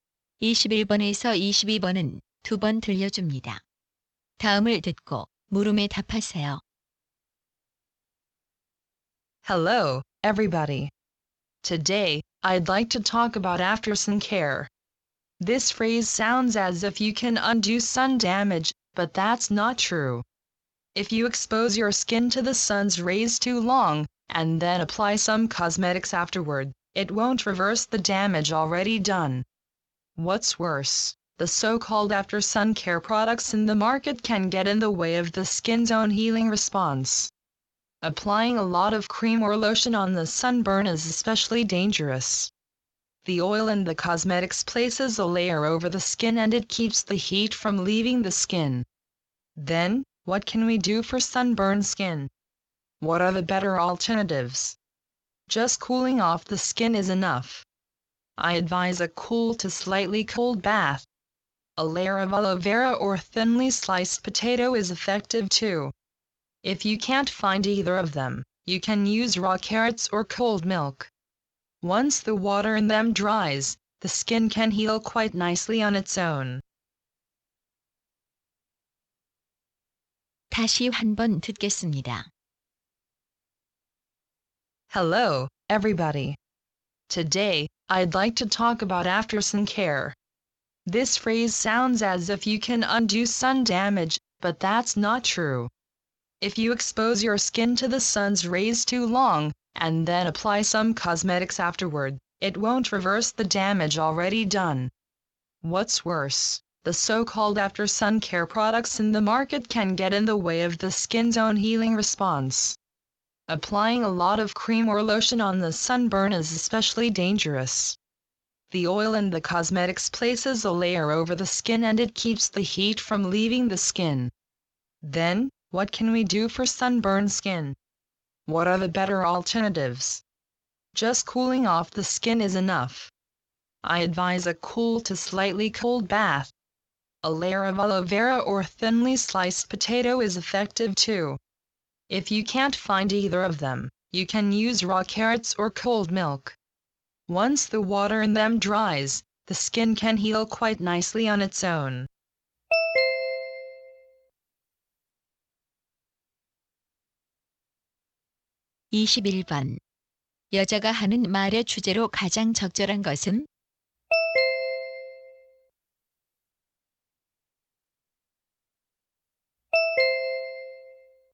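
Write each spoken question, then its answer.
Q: 여자가 하는 말의 주제로 가장 적절한 것은?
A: 햇볕에 탄 피부는 화장품 대신 시원하게 식혀 주는 것이 좋다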